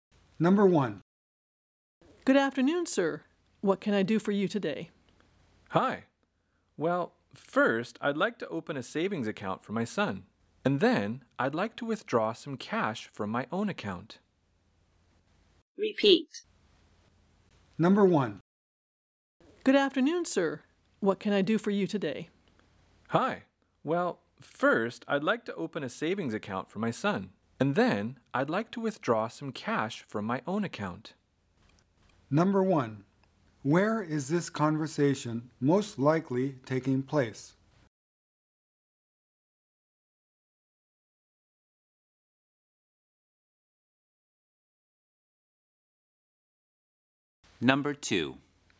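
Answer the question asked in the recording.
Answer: At a bank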